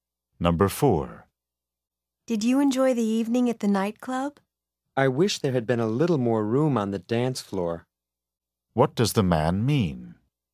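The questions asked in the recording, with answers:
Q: What does the man mean?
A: The dance floor was too crowded.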